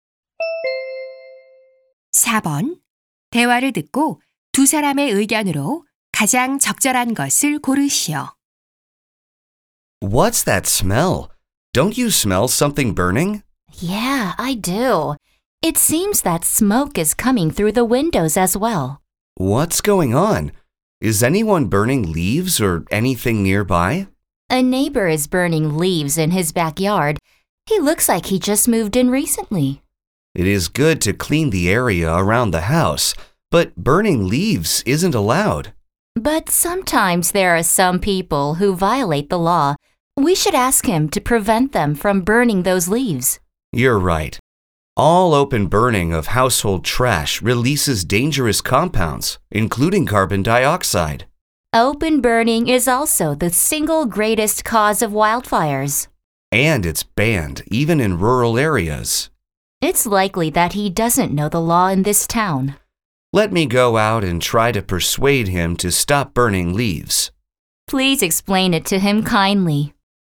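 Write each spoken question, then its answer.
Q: 대화를 듣고 두 사람의 의견으로 가장 적절한 것을 고르시오.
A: 낙엽 등을 야외에서 태우는 것은 위험하고 금지되어 있으므로 하지 말아야 한다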